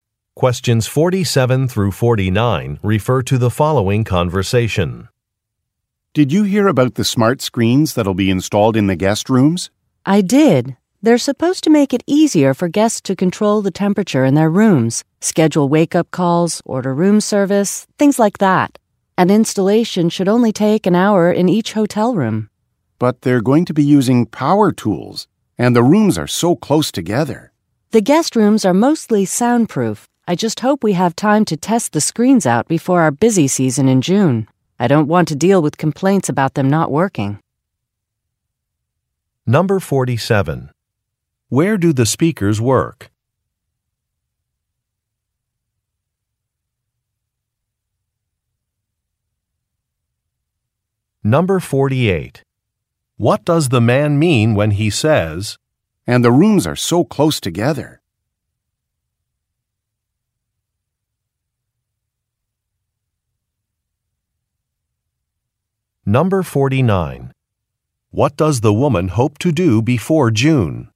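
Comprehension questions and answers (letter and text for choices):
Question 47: Where do the speakers work?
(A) At a hardware store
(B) At a construction site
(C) At a factory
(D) At a hotel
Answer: (D) At a hotel

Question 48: What does the man mean when he says, "And the rooms are so close together"?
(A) Some renovations will be finished quickly.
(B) A work schedule will be revised.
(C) Noise levels will be a problem.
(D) An architect should be consulted.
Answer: (C) Noise levels will be a problem.

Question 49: What does the woman hope to do before June?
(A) Take inventory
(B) Order new uniforms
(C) Test out some technology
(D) Prepare for an inspection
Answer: (C) Test out some technology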